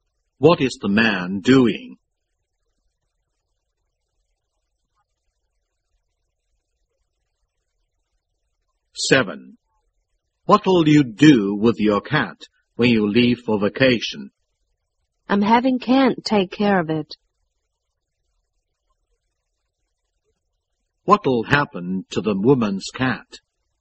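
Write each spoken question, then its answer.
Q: What'll happen to the woman's cat?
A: Kent will take care of it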